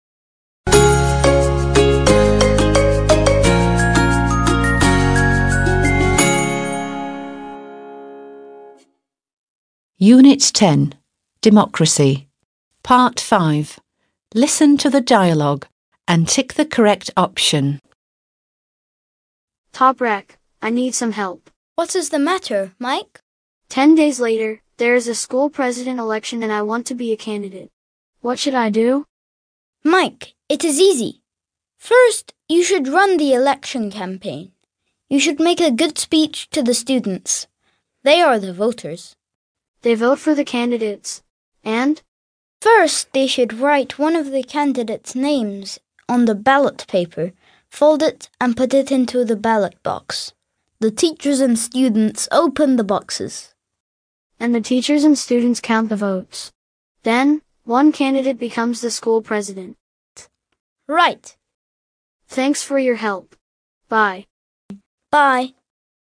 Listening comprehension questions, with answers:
5. Listen to the dialogue and tick the correct option.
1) What is the dialogue about?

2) Who is the candidate?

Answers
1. school presidential election
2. Mike

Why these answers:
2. Mike, "I want to be a candidate" diyor.

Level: 6. Sınıf